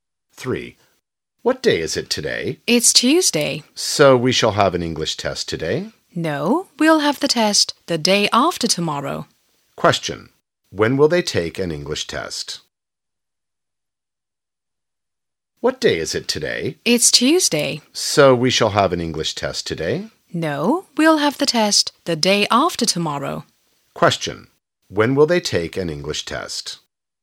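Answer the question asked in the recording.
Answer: On Thursday (the day after tomorrow)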